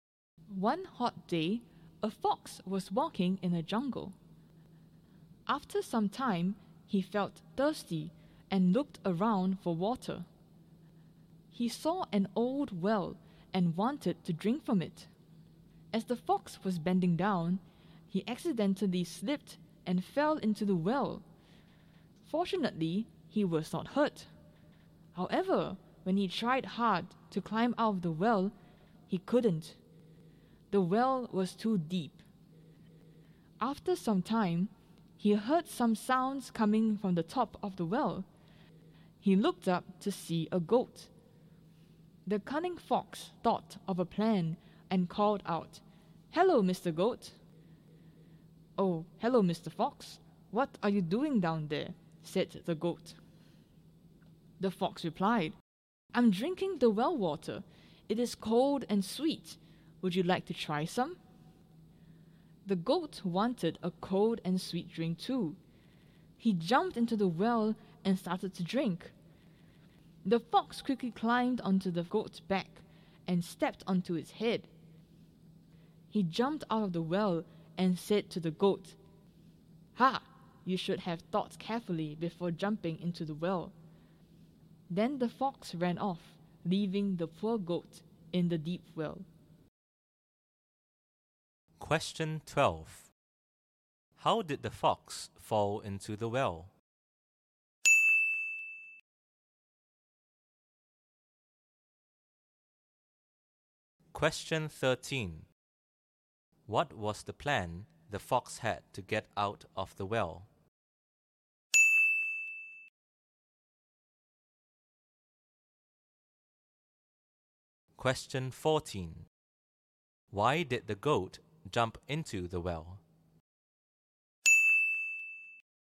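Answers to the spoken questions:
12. He slipped while bending down to drink.
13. To trick the goat into jumping in, then climb on its back and head to get out.
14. He wanted a cold and sweet drink too.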